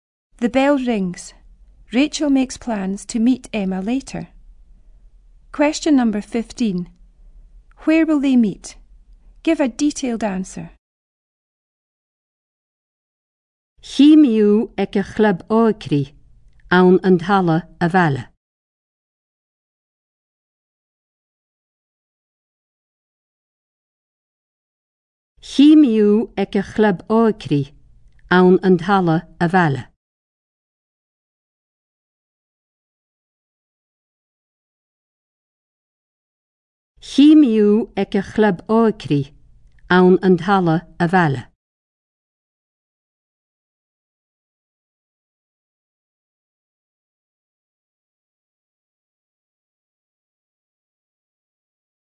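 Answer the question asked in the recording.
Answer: At the youth club in the village hall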